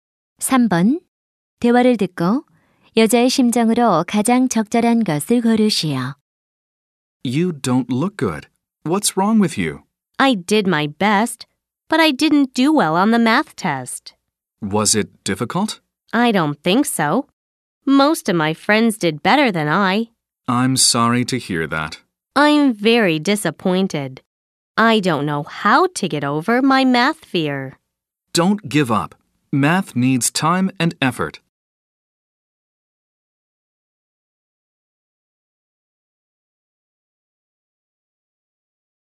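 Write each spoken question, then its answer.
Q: 대화를 듣고 여자의 심정으로 가장 적절한 것을 고르시오.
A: 실망함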